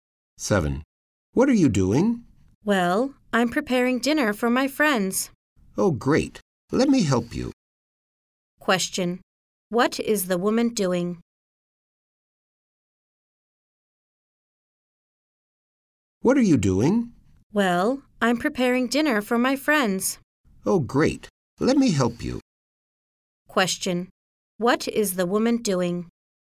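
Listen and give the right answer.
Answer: Preparing dinner for her friends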